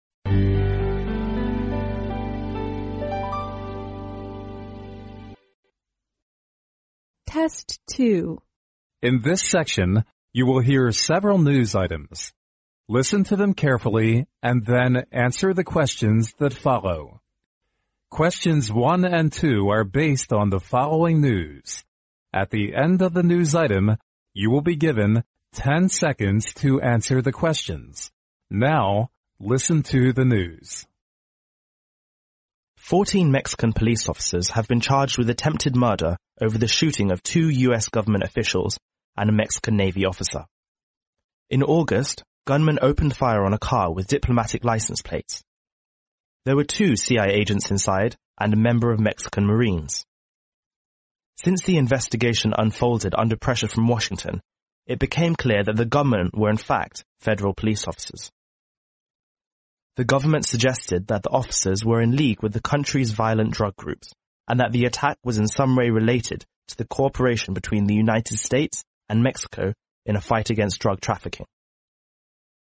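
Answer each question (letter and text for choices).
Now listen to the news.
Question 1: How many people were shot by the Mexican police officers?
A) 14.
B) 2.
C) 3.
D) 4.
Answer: C) 3.

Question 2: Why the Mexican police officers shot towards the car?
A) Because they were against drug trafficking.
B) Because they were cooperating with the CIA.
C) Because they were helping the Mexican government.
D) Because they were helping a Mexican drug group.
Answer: D) Because they were helping a Mexican drug group.

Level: 英语四级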